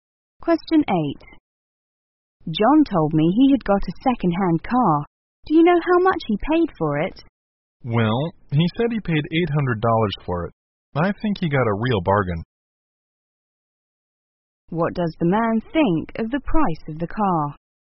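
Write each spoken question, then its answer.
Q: What does the man think of the price of the car?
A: It was very cheap, a real bargain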